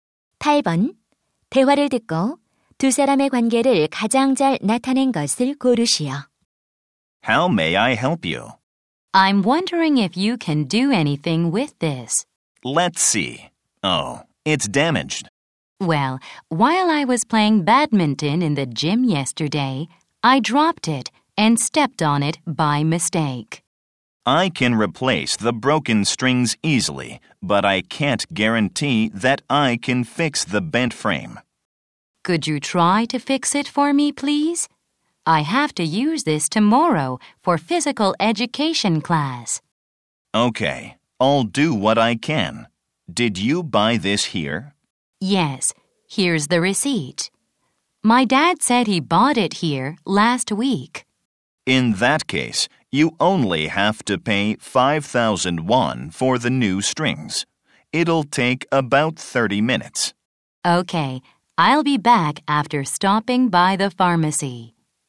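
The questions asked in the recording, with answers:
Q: 대화를 듣고 두 사람의 관계를 가장 잘 나타낸 것을 고르시오.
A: 라켓 수리점 직원과 고객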